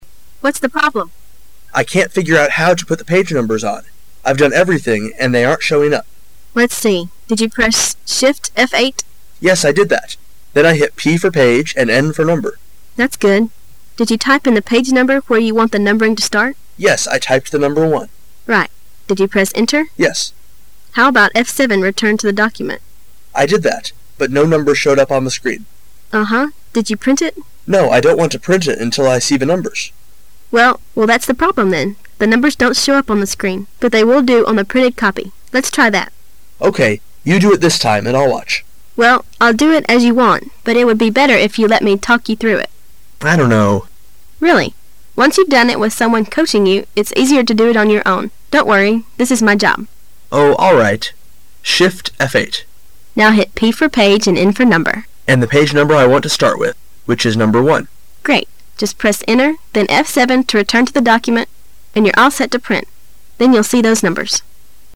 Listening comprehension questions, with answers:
What does the woman want the man to do?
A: She wants the man to try to do it while she gives him instructions.

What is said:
What's the problem? M: I can't figure out how to put the page numbers on. I've done everything and they aren't showing up. W: Let's see, did you press Shift, F-8 ? M: Yes, I did that. Then I hit P for page and N for number. That's good. Did you type in the page number where you want the numbering to start? M: Yes. I typed the number 1. W: Right. But no numbers showed up on the screen. W: Unhuh, did you print it? M: No, I don't want to print it until I see the numbers. W: Well, that's the problem then. The numbers don't show up on the screen. But they will do on the printed copy. Lot's try that. M: Okay. You do it this time, and I'll watch. W: Well, I'll do it as you want, but it would be better it you let me talk you through it. M: I don't know. W: Really. Once you've done it with someone coaching you, it's easier to do it on your own. Don't worry. This is my job. M: Oh, all right. M: And the page number I want to start with which is number 1. W: Great. Just press Enter, then F-7 to return to the document, and you're all set to print. Then you'll see those numbers.